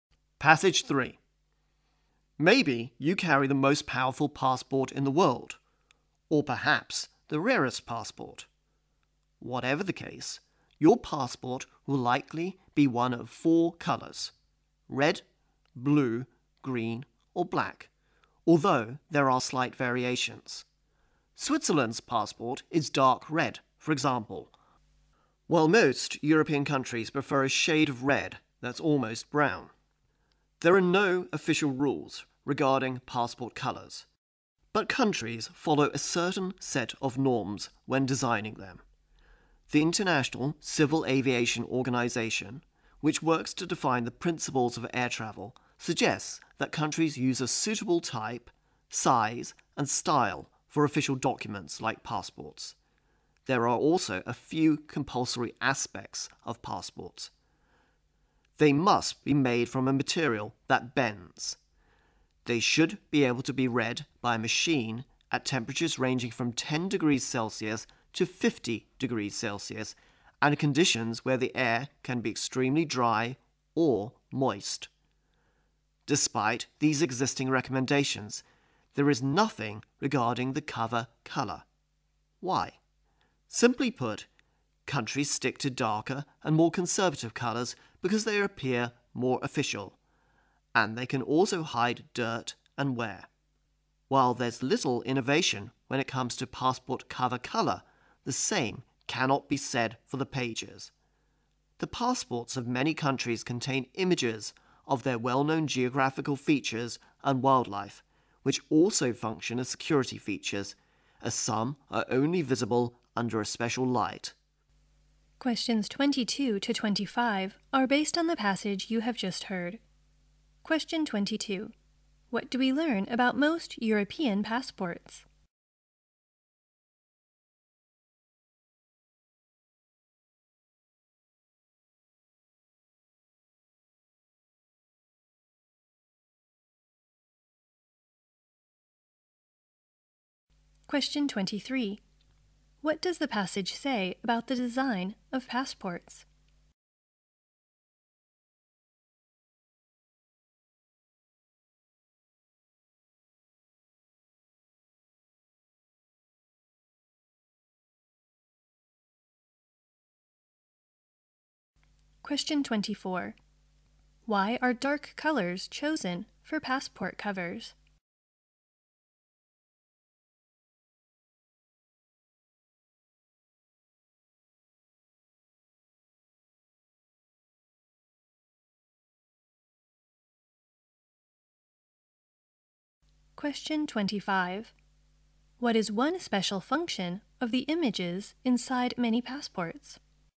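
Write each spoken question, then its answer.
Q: What do we learn about most European passports?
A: They are a shade of red that's almost brown

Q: Why are dark colors chosen for passport covers?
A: They look more official and hide dirt and wear

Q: What is one special function of the images inside many passports?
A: They serve as security features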